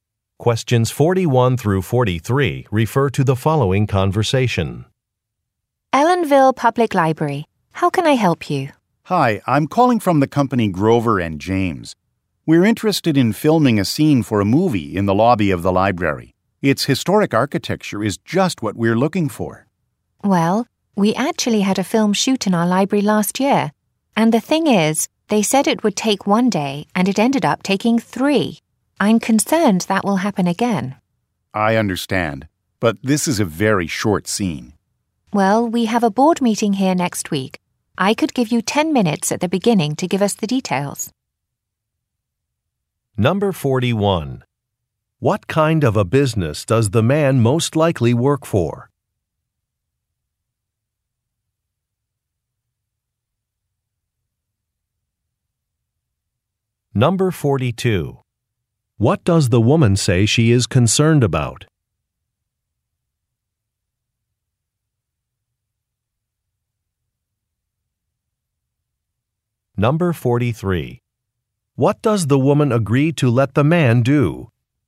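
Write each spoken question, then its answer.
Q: What kind of a business does the man most likely work for?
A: A film production company

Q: What does the woman say she is concerned about?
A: The filming taking longer than planned

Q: What does the woman agree to let the man do?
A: Speak for 10 minutes at a board meeting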